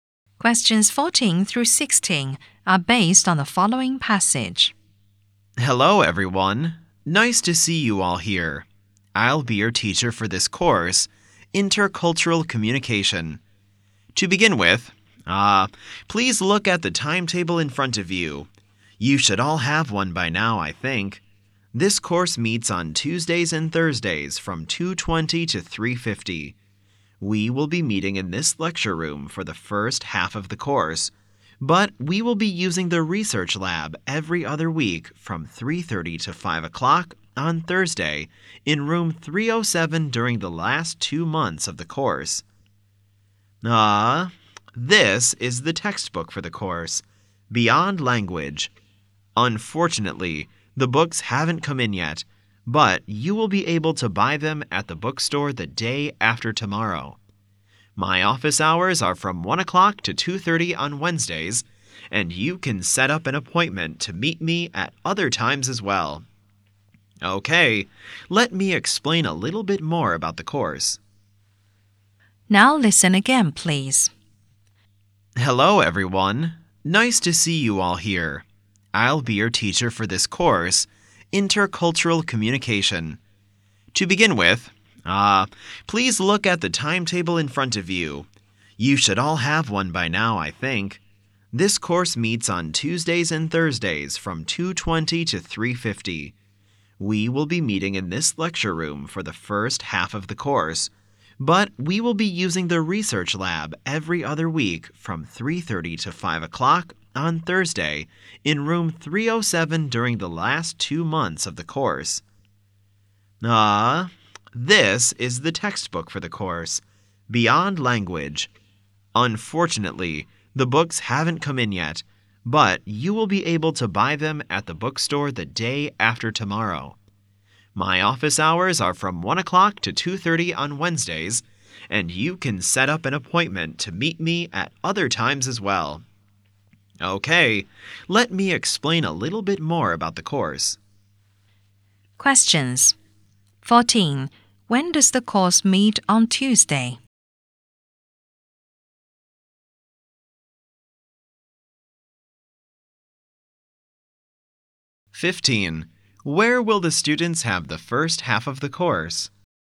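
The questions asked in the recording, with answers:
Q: When does the course meet on Tuesday?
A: From 2:20 to 3:50.

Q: Where will the students have the first half of the course?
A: In this lecture room.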